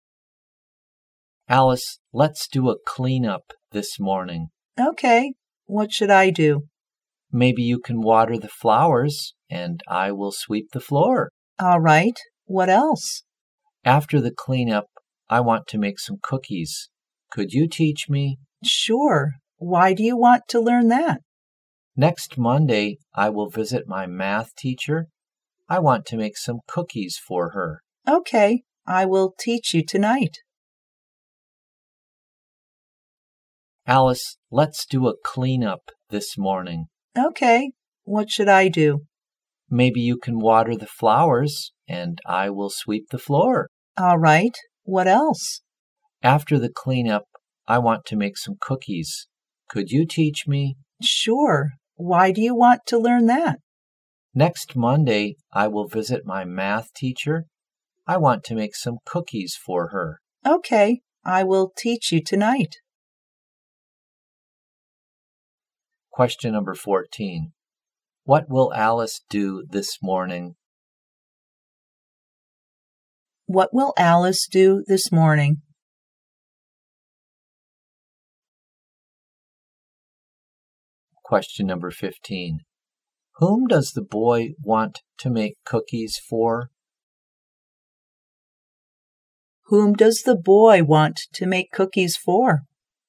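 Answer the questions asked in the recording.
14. Water the flowers
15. His math teacher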